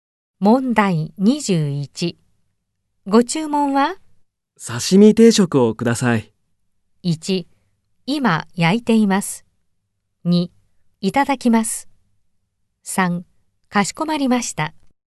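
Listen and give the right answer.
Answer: 3: かしこまりました。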